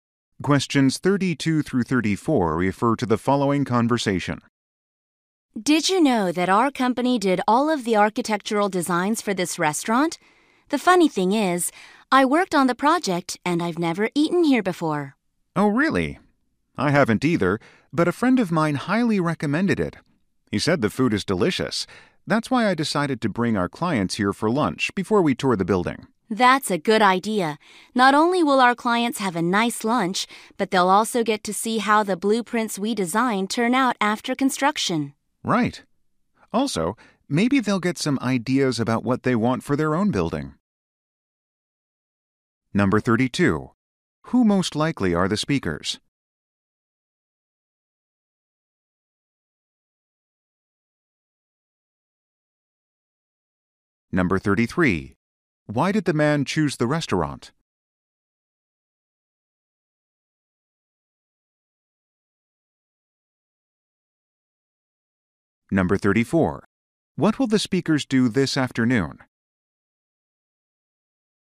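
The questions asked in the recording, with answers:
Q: Who most likely are the speakers?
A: Architects (architectural designers)

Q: Why did the man choose the restaurant?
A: A friend highly recommended it

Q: What will the speakers do this afternoon?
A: Tour the building with clients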